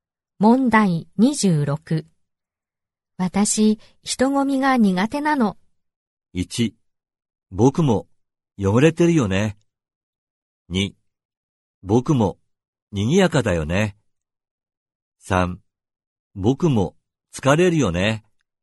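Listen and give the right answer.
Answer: 3: 僕も疲れるよね。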